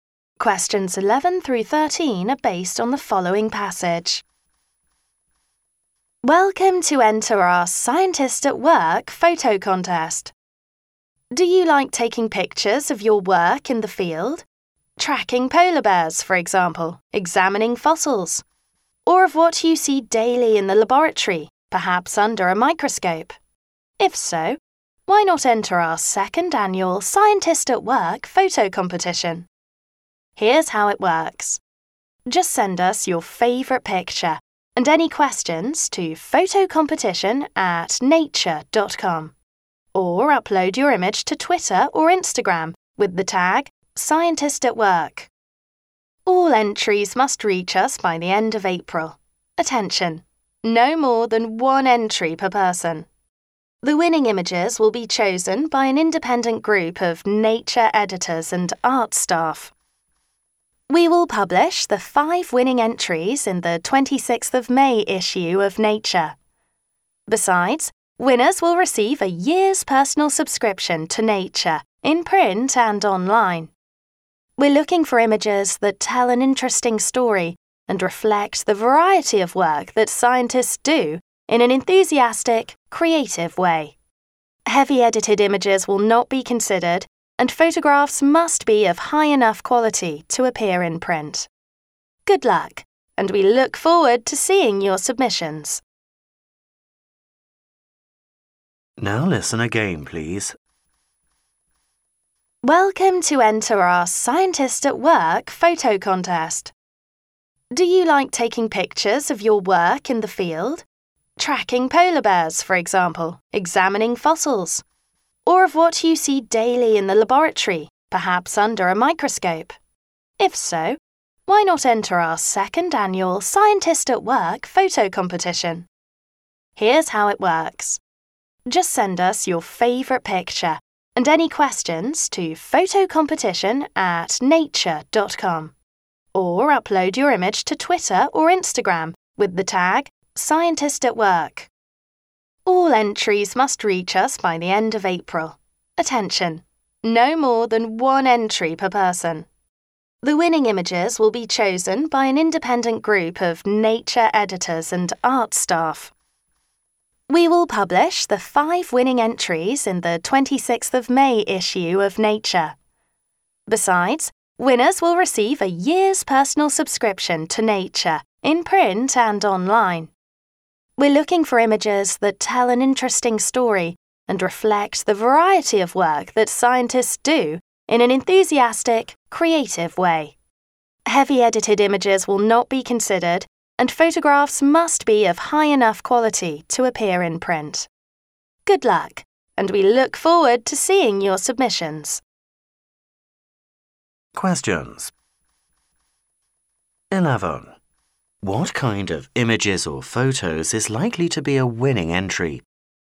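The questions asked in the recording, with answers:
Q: What kind of images or photos is likely to be a winning entry?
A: Images that tell an interesting story and show the variety of scientists' work in a creative way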